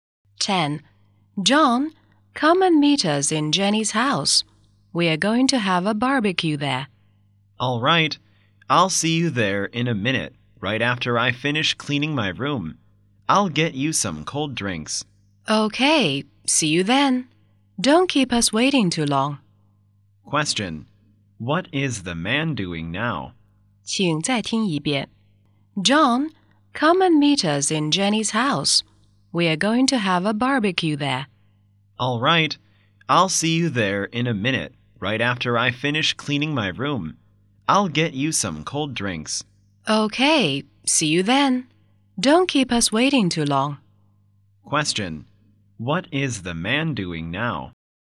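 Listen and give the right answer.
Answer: Cleaning his room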